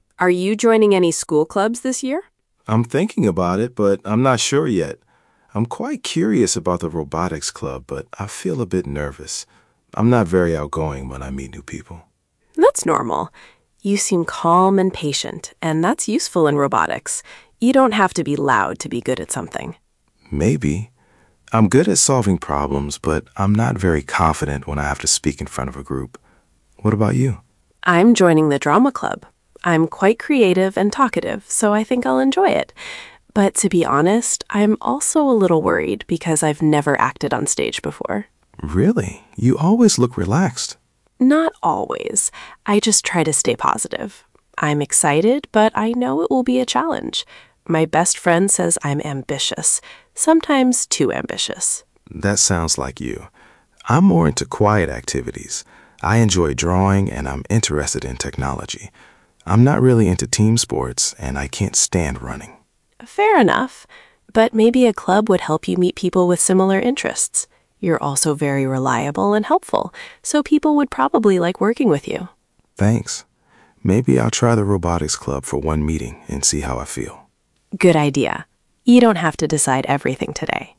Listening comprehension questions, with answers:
C — True or false?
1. Leo is interested in technology.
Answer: True

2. Leo loves team sports.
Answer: False

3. Maya has acted on stage many times before.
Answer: False

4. Maya thinks Leo could meet people with similar interests.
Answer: True

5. Leo decides to try the robotics club.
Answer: True

A — Listen for gist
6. What are Maya and Leo talking about?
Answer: They are talking about school clubs and their personality, feelings and interests.

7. Which club is Leo interested in?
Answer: Leo is interested in the robotics club.

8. Which club is Maya joining?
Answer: Maya is joining the drama club.

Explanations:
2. he is not into team sports and can't stand running.
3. she has never acted on stage before.
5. "Maybe I'll try the robotics club for one meeting."

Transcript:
Maya: Are you joining any school clubs this year?
Leo: I'm thinking about it, but I'm not sure yet. I'm quite curious about the robotics club, but I feel a bit nervous. I'm not very outgoing when I meet new people.
Maya: That's normal. You seem calm and patient, and that's useful in robotics. You don't have to be loud to be good at something.
Leo: Maybe. I'm good at solving problems, but I'm not very confident when I have to speak in front of a group. What about you?
Maya: I'm joining the drama club. I'm quite creative and talkative, so I think I'll enjoy it. But to be honest, I'm also a little worried because I've never acted on stage before.
Leo: Really? You always look relaxed.
Maya: Not always! I just try to stay positive. I'm excited, but I know it will be a challenge. My best friend says I'm ambitious, sometimes too ambitious.
Leo: That sounds like you. I'm more into quiet activities. I enjoy drawing and I'm interested in technology. I'm not really into team sports, and I can't stand running.
Maya: Fair enough. But maybe a club would help you meet people with similar interests. You're also very reliable and helpful, so people would probably like working with you.
Leo: Thanks. Maybe I'll try the robotics club for one meeting and see how I feel.

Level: A2+/B1